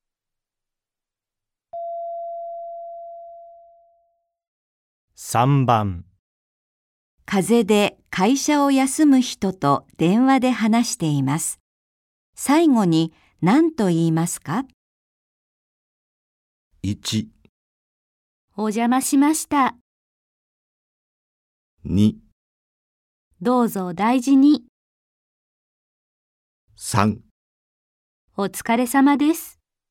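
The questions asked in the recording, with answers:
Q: 風邪で会社を休む人と電話で話しています。最後に何と言いますか?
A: 2: どうぞ大事に。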